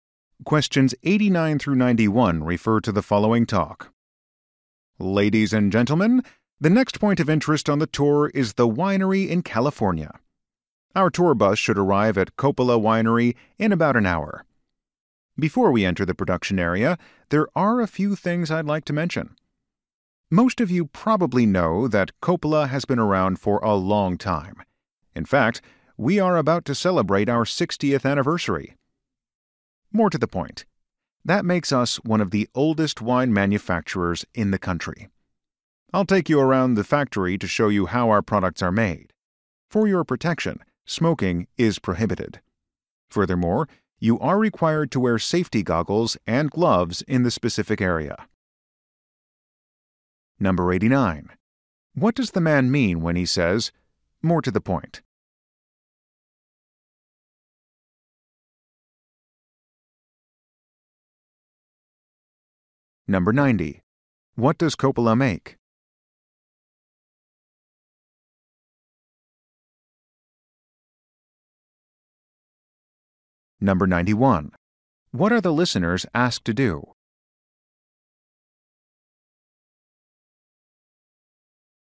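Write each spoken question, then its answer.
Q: What does Coppola make?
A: Wine

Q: What are the listeners asked to do?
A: Not smoke and wear safety goggles and gloves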